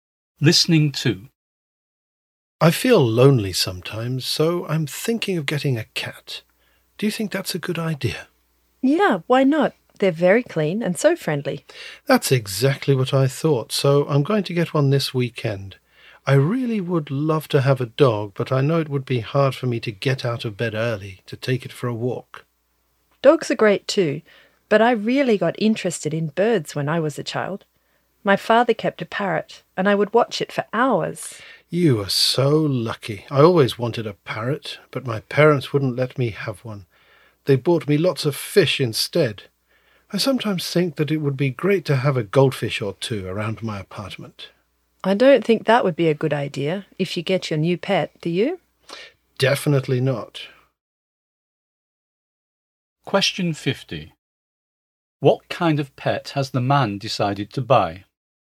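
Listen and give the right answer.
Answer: A cat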